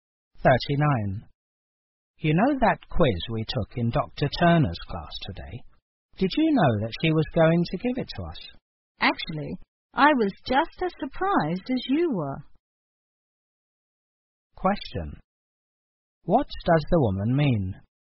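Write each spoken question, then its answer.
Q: What does the woman mean?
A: She did not know about the quiz either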